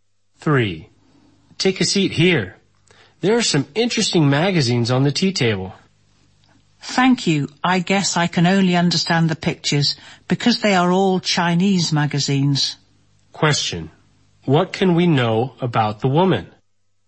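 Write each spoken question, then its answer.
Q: What can we know about the woman?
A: She can't read Chinese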